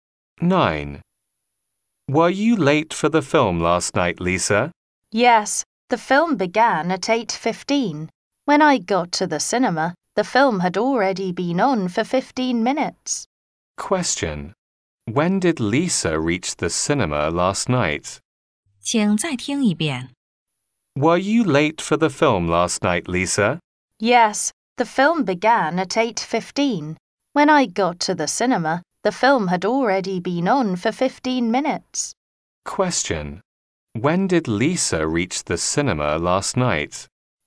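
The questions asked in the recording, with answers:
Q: When did Lisa reach the cinema last night?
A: At 8:30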